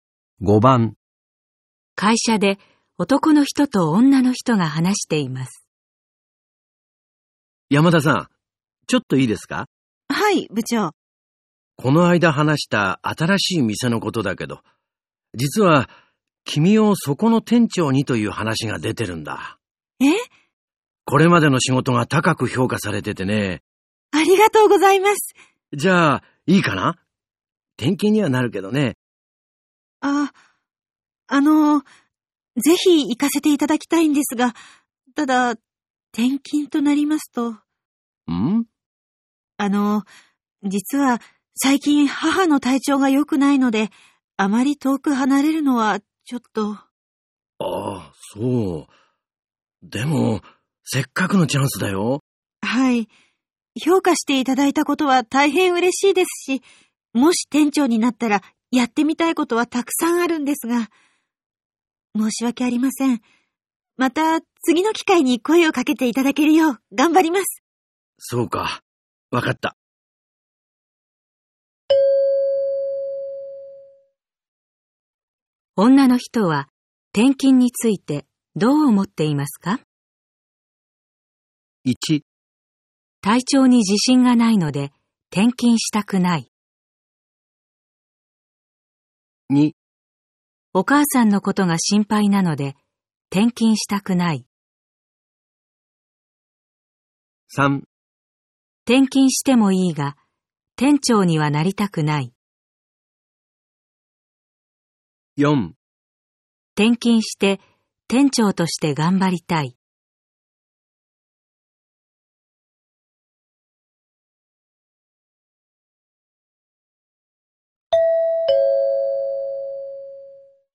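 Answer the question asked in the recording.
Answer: 2: お母さんのことが心配なので転勤したくない。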